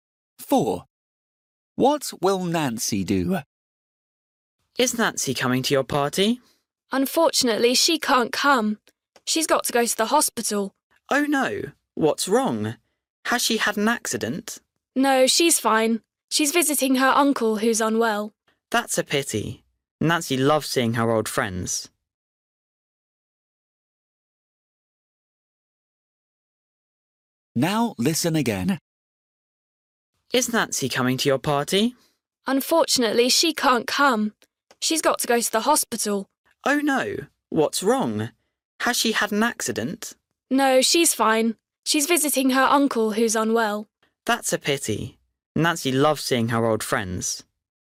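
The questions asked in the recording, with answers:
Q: What will Nancy do?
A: visit her sick uncle in hospital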